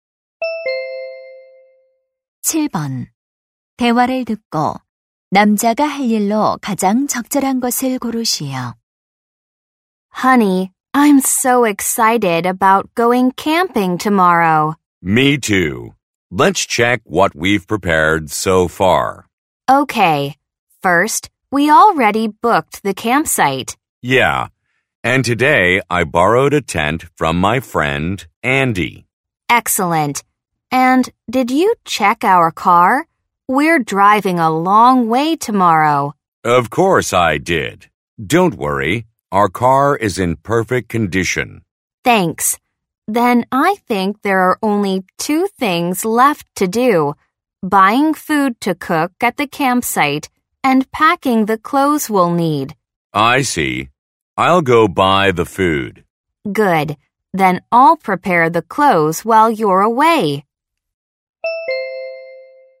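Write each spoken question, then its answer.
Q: 대화를 듣고 남자가 할 일로 가장 적절한 것을 고르시오.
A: 캠핑 음식 사러 가기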